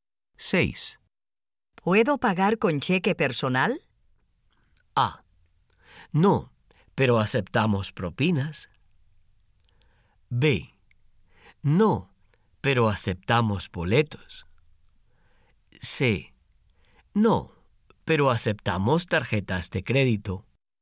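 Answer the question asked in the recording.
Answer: C: No, pero aceptamos tarjetas de crédito.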